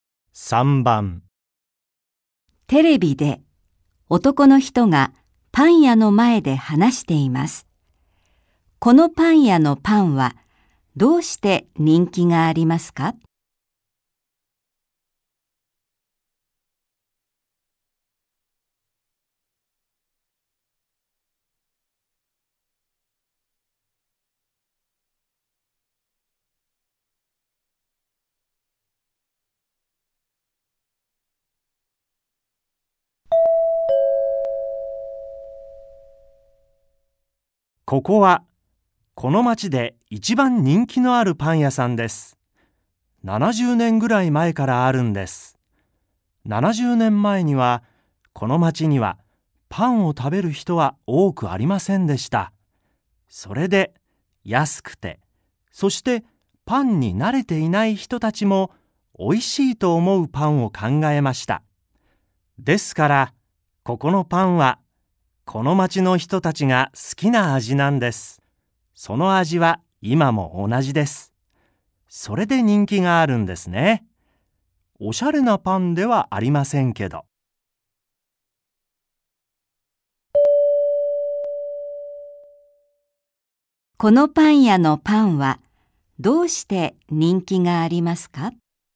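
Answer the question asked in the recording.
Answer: 町の人たちが好きな味で、その味が今も同じだから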